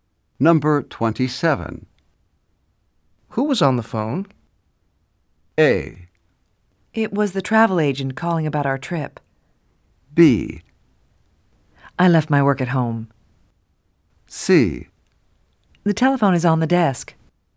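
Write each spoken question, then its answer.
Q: Who was on the phone?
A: A: It was the travel agent calling about our trip.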